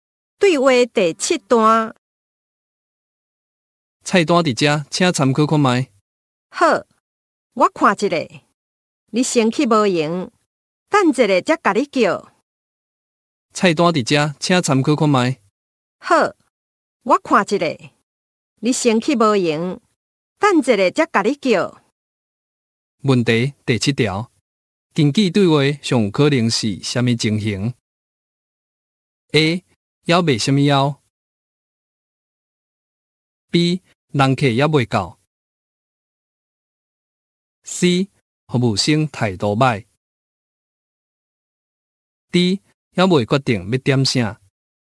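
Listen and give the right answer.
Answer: D: 要未决定要点啥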